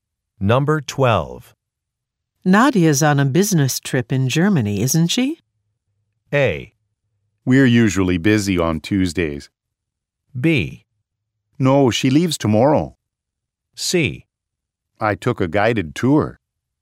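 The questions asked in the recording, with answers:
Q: Nadia's on a business trip in Germany, isn't she?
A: B: No, she leaves tomorrow.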